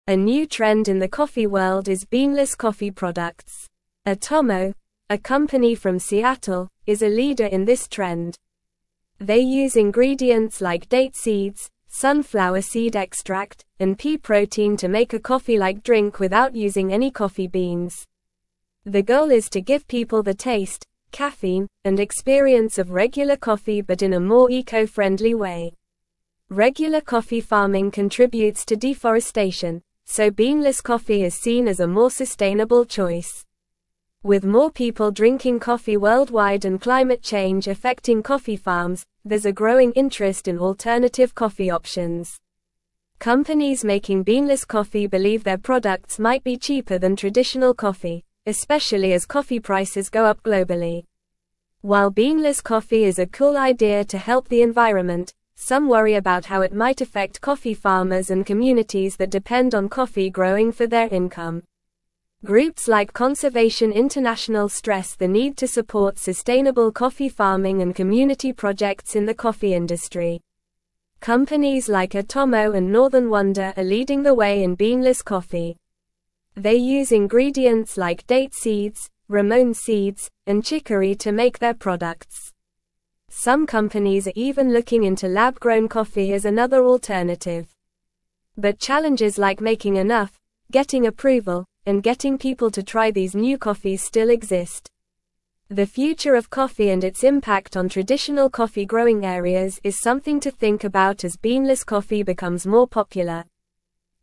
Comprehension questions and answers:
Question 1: A new (1)______ in the coffee world is beanless coffee products.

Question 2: (2)______, a company from Seattle, is a leader in this trend.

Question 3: They use (3)______ like date seeds, sunflower seed extract, and pea protein to make a coffee-like drink without using any coffee beans.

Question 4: The goal is to give (4)______ the taste, caffeine, and experience of regular coffee but in a more eco-friendly way.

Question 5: Regular coffee farming contributes to (5)______, so beanless coffee is seen as a more (6)______ choice.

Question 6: Regular coffee farming contributes to (5)______, so beanless coffee is seen as a more (6)______ choice.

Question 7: With more people drinking coffee worldwide and climate change affecting coffee (7)______, there's a growing interest in alternative coffee options.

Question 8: (8)______ making beanless coffee believe their products might be cheaper than traditional coffee, especially as coffee prices go up globally.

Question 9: While beanless coffee is a cool idea to help the environment, some (9)______ about how it might affect (10)______ farmers and communities that depend on coffee (11)______ for their income.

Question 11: While beanless coffee is a cool idea to help the environment, some (9)______ about how it might affect (10)______ farmers and communities that depend on coffee (11)______ for their income.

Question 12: Companies like Atomo and (12)______ Wonder are leading the way in beanless coffee.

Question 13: Some (13)______ are even looking into lab-grown coffee as another alternative.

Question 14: But (14)______ like making enough, getting approval, and getting people to try these new coffees still exist.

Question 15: The (15)______ of coffee and its impact on traditional coffee-growing areas is something to think about as beanless coffee (16)______ more popular.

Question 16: The (15)______ of coffee and its impact on traditional coffee-growing areas is something to think about as beanless coffee (16)______ more popular.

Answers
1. trend
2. Atomo
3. ingredients
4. people
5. deforestation
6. sustainable
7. farms
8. Companies
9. worry
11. growing
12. Northern
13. companies
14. challenges
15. future
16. becomes

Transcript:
A new trend in the coffee world is beanless coffee products. Atomo, a company from Seattle, is a leader in this trend. They use ingredients like date seeds, sunflower seed extract, and pea protein to make a coffee-like drink without using any coffee beans. The goal is to give people the taste, caffeine, and experience of regular coffee but in a more eco-friendly way.
Regular coffee farming contributes to deforestation, so beanless coffee is seen as a more sustainable choice. With more people drinking coffee worldwide and climate change affecting coffee farms, there's a growing interest in alternative coffee options. Companies making beanless coffee believe their products might be cheaper than traditional coffee, especially as coffee prices go up globally.
While beanless coffee is a cool idea to help the environment, some worry about how it might affect coffee farmers and communities that depend on coffee growing for their income. Groups like Conservation International stress the need to support sustainable coffee farming and community projects in the coffee industry.
Companies like Atomo and Northern Wonder are leading the way in beanless coffee. They use ingredients like date seeds, ramón seeds, and chicory to make their products. Some companies are even looking into lab-grown coffee as another alternative. But challenges like making enough, getting approval, and getting people to try these new coffees still exist. The future of coffee and its impact on traditional coffee-growing areas is something to think about as beanless coffee becomes more popular.

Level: Level 3